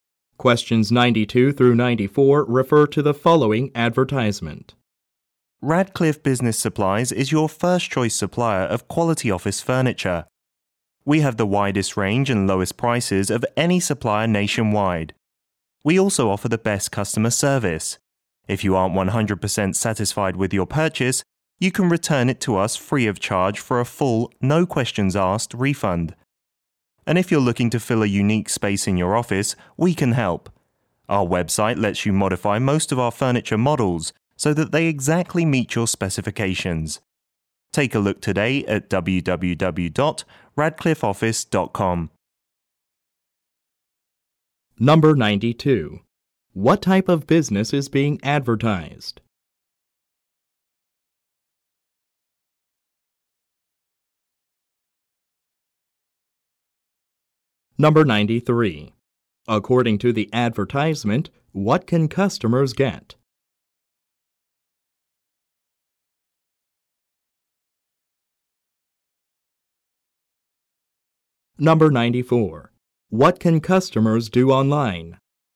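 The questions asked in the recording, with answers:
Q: What type of business is being advertised?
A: An office furniture supplier

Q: What can customers do online?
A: Modify furniture to their specifications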